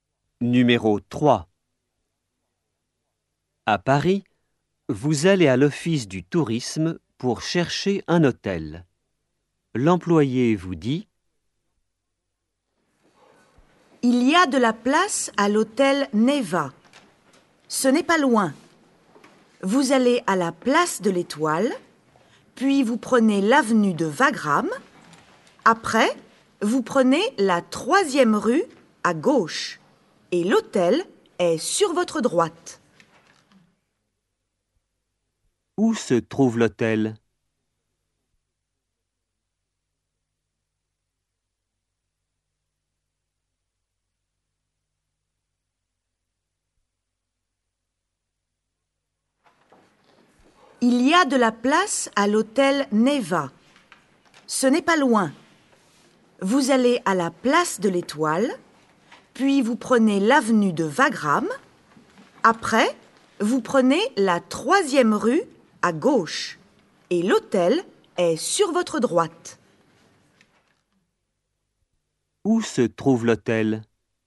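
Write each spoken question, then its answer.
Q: Où se trouve l'hôtel ?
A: dans la troisième rue à gauche après l'avenue de Wagram, sur la droite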